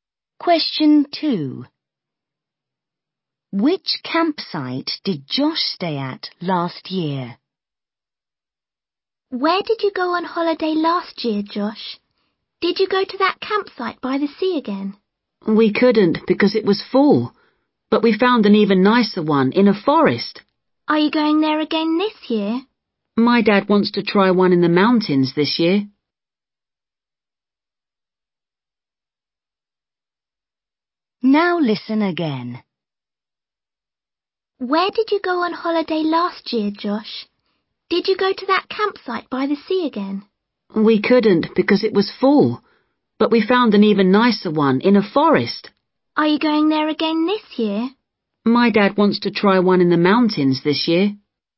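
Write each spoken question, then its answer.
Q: Which campsite did Josh stay at last year?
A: One in a forest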